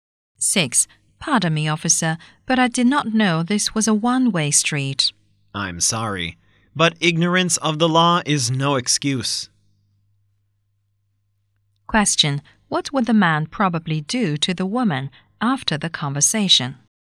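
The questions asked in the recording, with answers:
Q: What would the man probably do to the woman after the conversation?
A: Give her a ticket (fine her)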